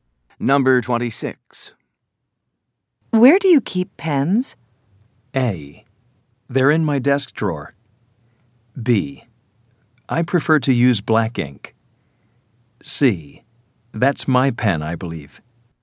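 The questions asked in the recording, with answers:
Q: Where do you keep pens?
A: A: They're in my desk drawer.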